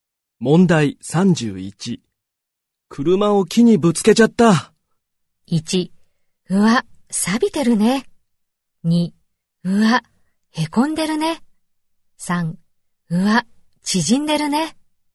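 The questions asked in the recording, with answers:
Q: 車を木にぶつけちゃった。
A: 2: うわ、へこんでるね。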